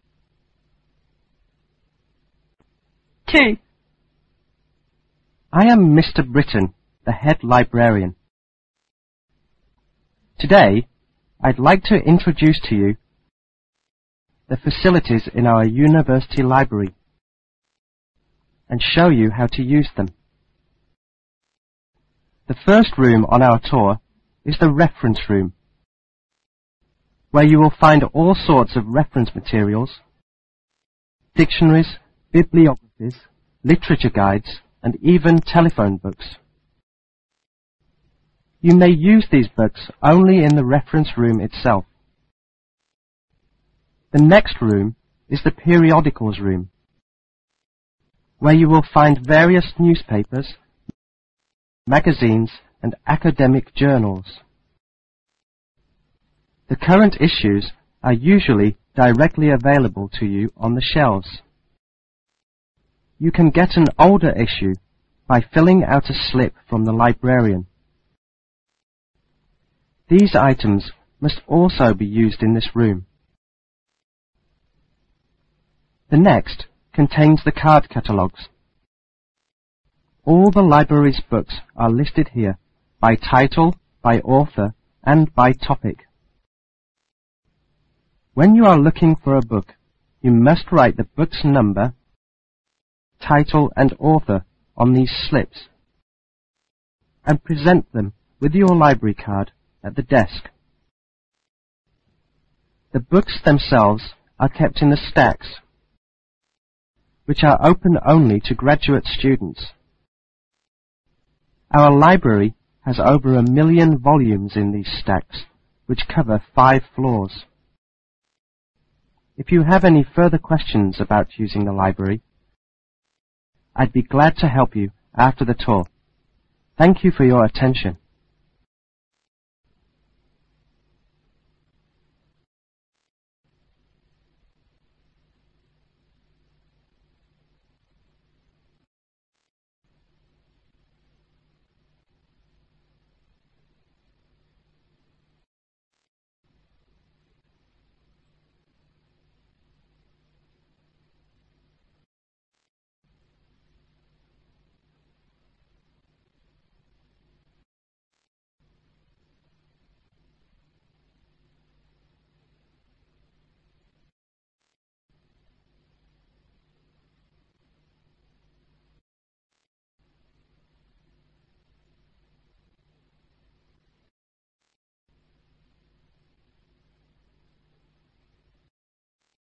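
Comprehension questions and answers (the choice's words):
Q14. What is the main topic of the talk?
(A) Use of library facilities.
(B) Library regulations.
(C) Library personnel.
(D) Location of the library.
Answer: Use of library facilities.

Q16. Which people are usually not allowed to use the stacks?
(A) Graduate students.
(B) Undergraduate students.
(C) Professors.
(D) Library employees.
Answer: Undergraduate students.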